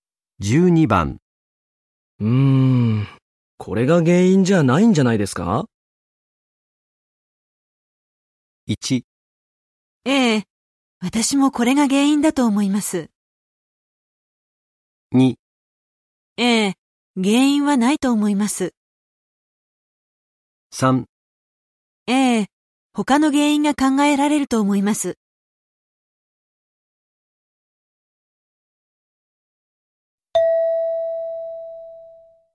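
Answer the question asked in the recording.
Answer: 3: ええ、他の原因が考えられると思います。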